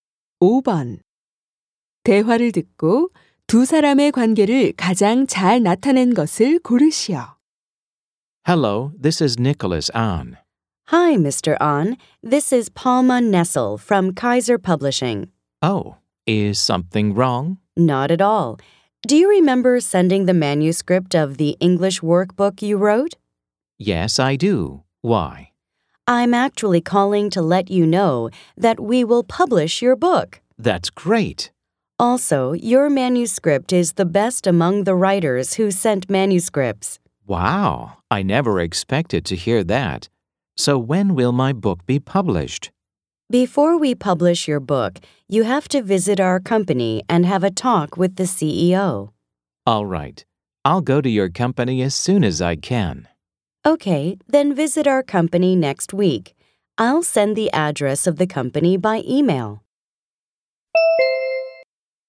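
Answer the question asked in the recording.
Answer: 작가와 출판사 직원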